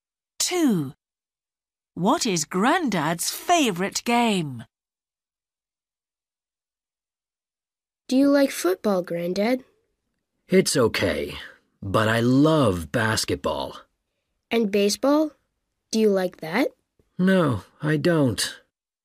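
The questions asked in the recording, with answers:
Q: What is Grandad's favourite game?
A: basketball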